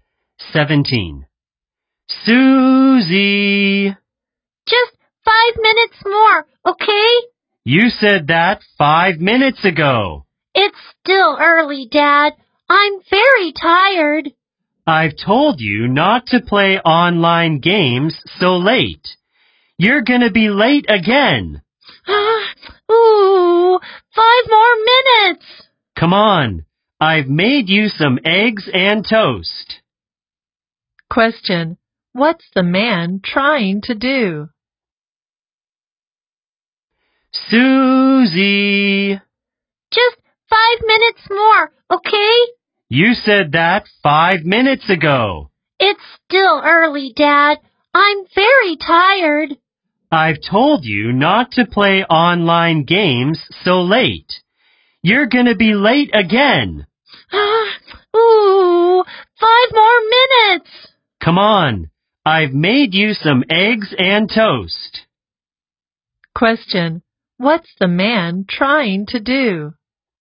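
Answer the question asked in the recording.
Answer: wake Susie up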